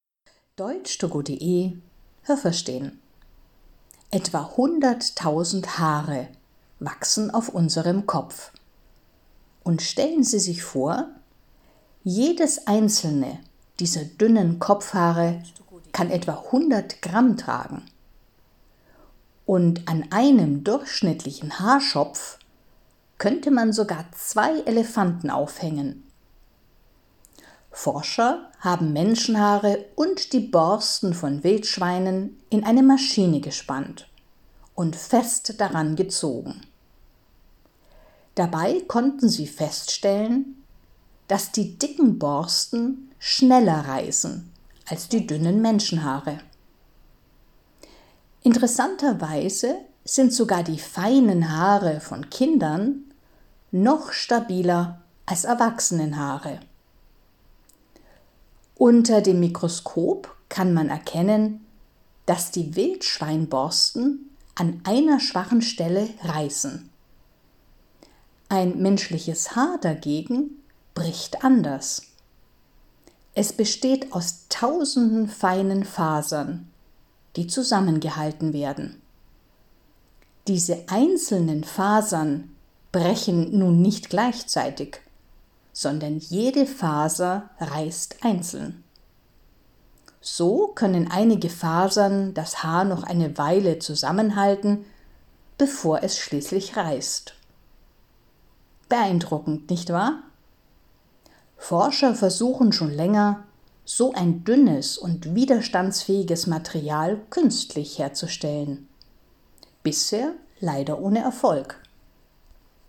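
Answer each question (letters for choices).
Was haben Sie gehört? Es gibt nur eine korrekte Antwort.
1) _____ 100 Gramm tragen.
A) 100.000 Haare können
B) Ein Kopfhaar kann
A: B

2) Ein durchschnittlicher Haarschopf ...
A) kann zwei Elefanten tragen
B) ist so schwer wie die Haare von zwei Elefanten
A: A

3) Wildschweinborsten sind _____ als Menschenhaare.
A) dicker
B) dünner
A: A

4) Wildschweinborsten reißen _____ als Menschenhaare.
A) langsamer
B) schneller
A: B

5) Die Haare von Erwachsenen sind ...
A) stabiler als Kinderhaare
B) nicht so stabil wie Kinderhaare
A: B

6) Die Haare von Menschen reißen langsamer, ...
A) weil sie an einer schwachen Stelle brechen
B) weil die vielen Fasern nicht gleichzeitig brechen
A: B

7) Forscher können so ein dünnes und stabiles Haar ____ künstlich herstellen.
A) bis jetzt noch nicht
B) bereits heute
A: A

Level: B1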